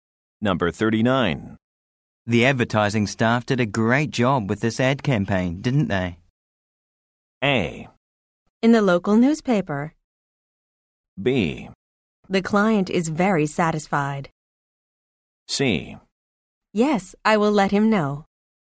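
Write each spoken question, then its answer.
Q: The advertising staff did a great job with this ad campaign, didn't they?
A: B: The client is very satisfied.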